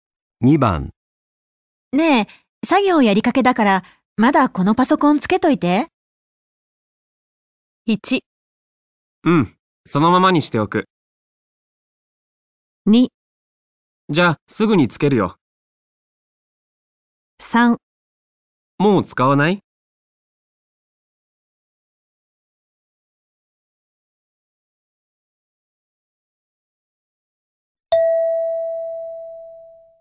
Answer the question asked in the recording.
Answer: 1

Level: N2 Listening · Test 3